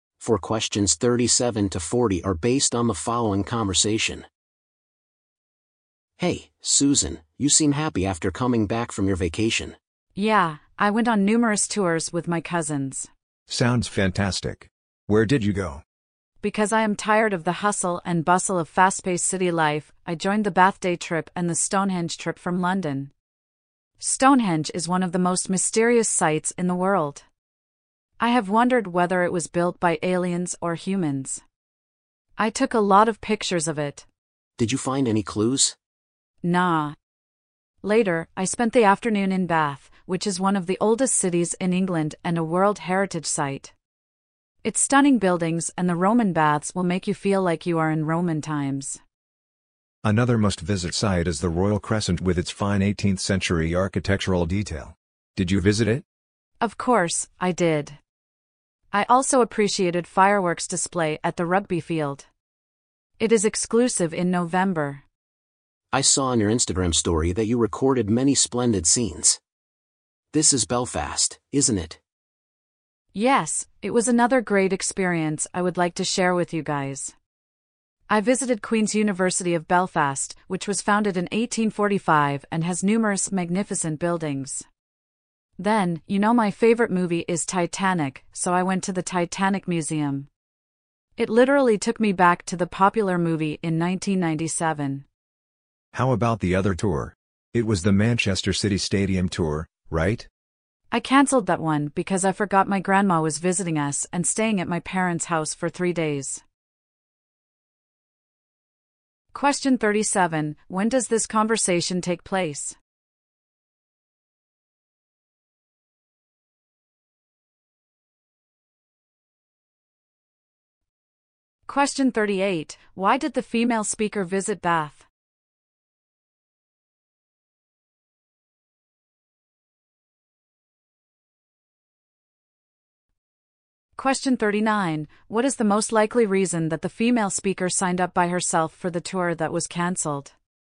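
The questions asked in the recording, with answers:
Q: Question 38, why did the female speaker visit Bath?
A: She was tired of the hustle and bustle of fast-paced city life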